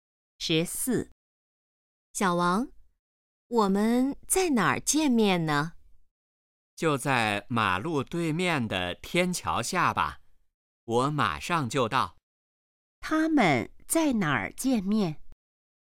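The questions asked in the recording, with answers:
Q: 他们在哪儿见面?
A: 马路对面的天桥下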